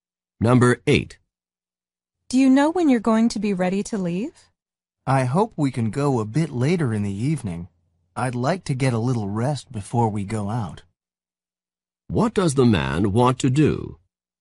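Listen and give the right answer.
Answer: Rest before leaving later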